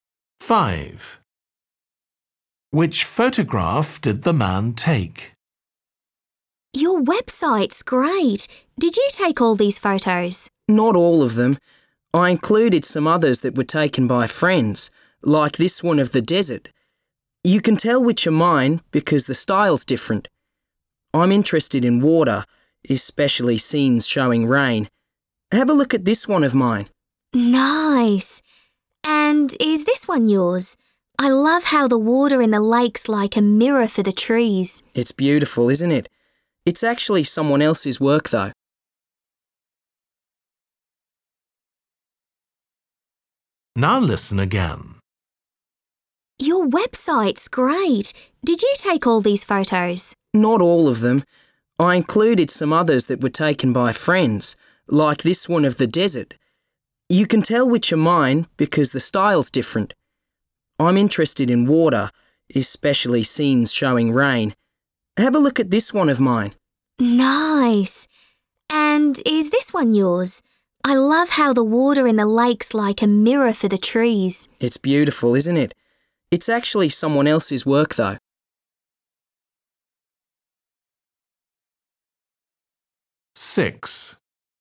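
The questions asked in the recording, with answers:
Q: Which photograph did the man take?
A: a photo of a rain scene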